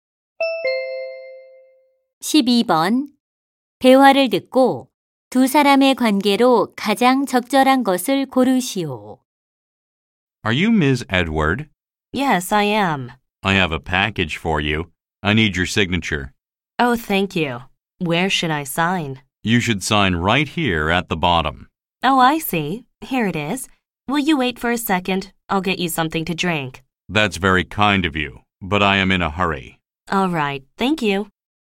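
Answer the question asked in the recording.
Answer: 택배 기사 - 고객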